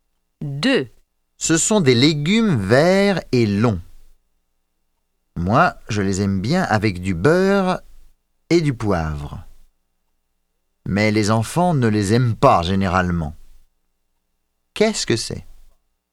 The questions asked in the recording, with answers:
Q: Qu'est-ce que c'est?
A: Ce sont des haricots verts.